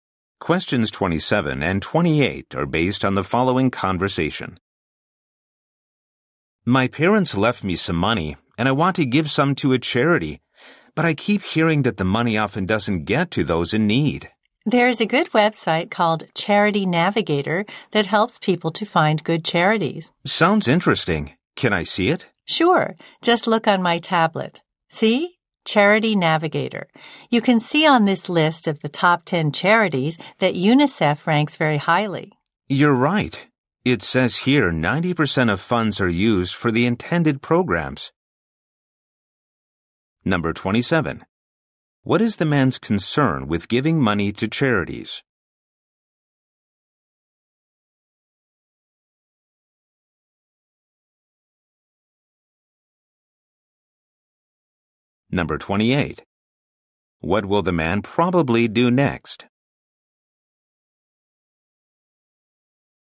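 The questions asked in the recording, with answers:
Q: What is the man's concern with giving money to charities?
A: The money often doesn't get to those in need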